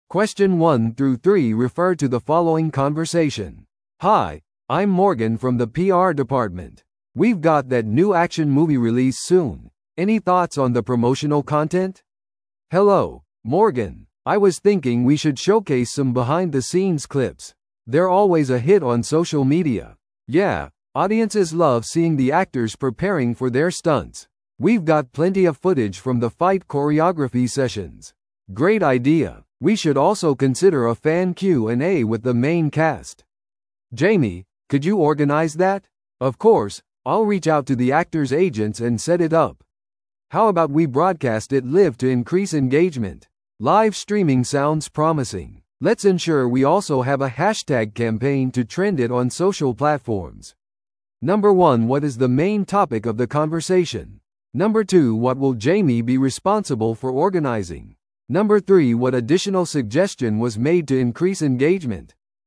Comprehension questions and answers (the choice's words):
Listen to the audio below and answer the questions.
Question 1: What is the main topic of the conversation?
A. 映画のプレミアのためのパレードの計画。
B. 俳優のための記者会見の準備。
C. ソーシャルメディアキャンペーンのための映像素材についての話し合い。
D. 映画撮影のロケ地の選択。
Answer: ソーシャルメディアキャンペーンのための映像素材についての話し合い。

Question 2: What will Jamie be responsible for organizing?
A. メイキングビデオシリーズ。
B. 俳優とのライブQ&Aセッション。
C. 戦闘振り付けの録画。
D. 映画館でのプロモーションイベント。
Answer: 俳優とのライブQ&Aセッション。

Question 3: What additional suggestion was made to increase engagement?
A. 無料の映画チケットを提供する。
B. 監督とのミート&グリートを開催する。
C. ソーシャルメディアでハッシュタグキャンペーンを使用する。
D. 独占映画トレーラーを公開する。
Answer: ソーシャルメディアでハッシュタグキャンペーンを使用する。

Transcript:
A: Hi, I'm Morgan from the PR department. We've got that new action movie release soon, any thoughts on the promotional content?
B: Hello, Morgan. I was thinking we should showcase some behind-the-scenes clips. They're always a hit on social media.
C: Yeah, audiences love seeing the actors preparing for their stunts. We've got plenty of footage from the fight choreography sessions.
A: Great idea. We should also consider a fan Q&A with the main cast. Jamie, could you organize that?
B: Of course, I'll reach out to the actors' agents and set it up. How about we broadcast it live to increase engagement?
C: Live streaming sounds promising. Let's ensure we also have a hashtag campaign to trend it on social platforms.